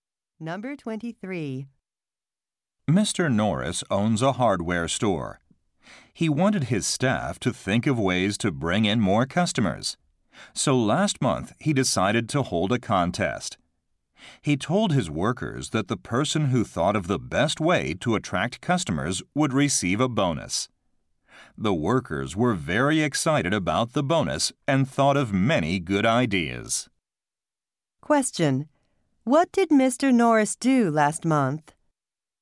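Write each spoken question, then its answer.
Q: What did Mr. Norris do last month?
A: He held a contest for ideas to attract customers.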